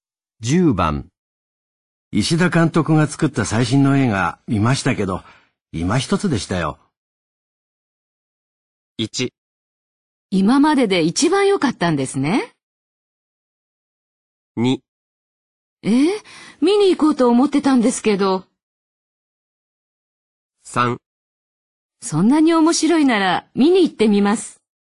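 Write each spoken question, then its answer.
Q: 石田監督が作った最新の映画見ましたけど、今一つでしたよ。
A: 2: 見に行こうと思ってたんですけど。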